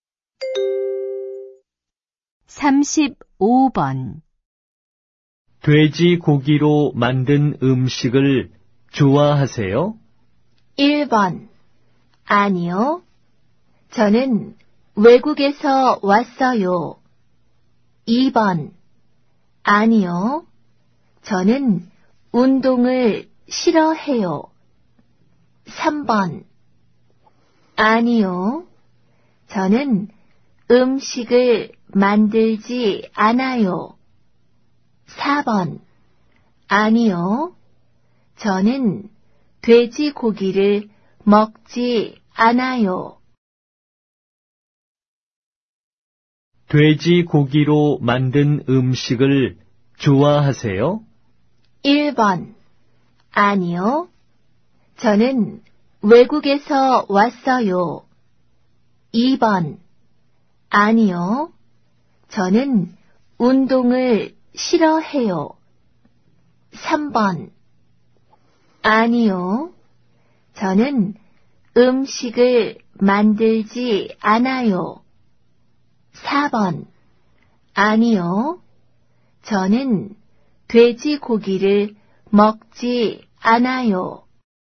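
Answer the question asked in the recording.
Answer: 4: 아니요. 저는 돼지고기를 먹지 않아요.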